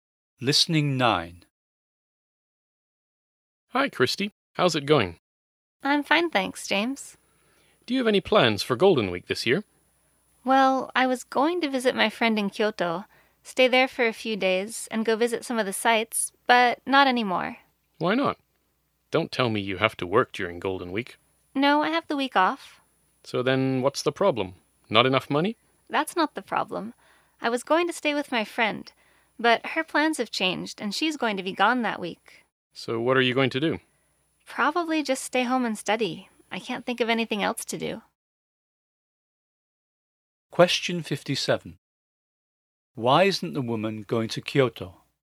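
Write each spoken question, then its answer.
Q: Why isn't the woman going to Kyoto?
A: Her friend's plans changed and she will be away that week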